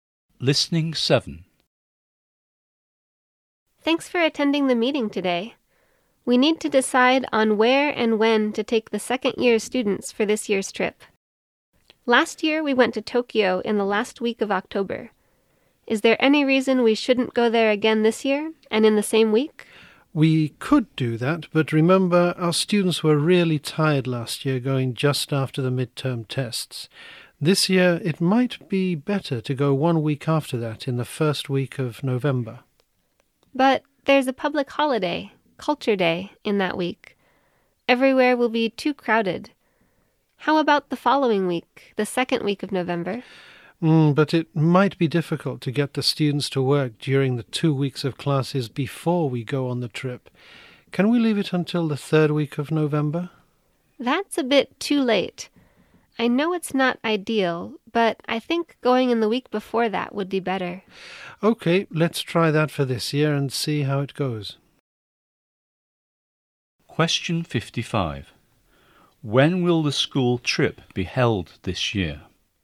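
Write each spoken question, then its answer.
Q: When will the school trip be held this year?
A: The second week of November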